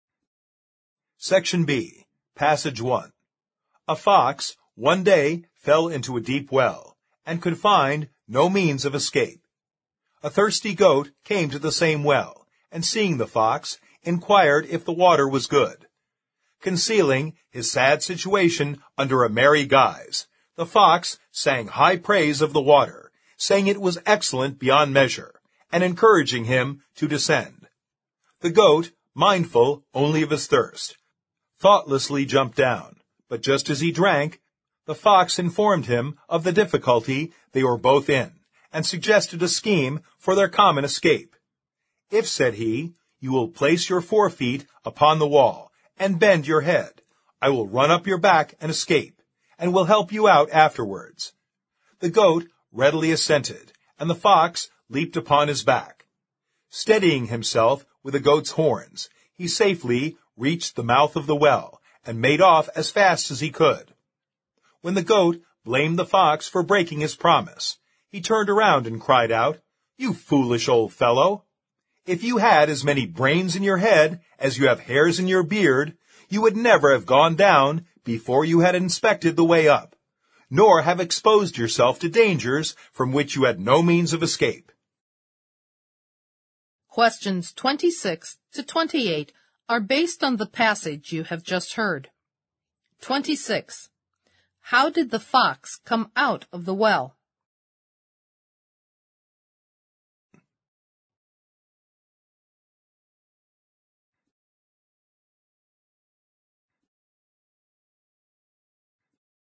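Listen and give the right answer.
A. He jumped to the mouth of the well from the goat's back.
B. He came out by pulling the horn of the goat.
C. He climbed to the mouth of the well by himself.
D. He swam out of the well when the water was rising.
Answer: A. He jumped to the mouth of the well from the goat's back.

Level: 四级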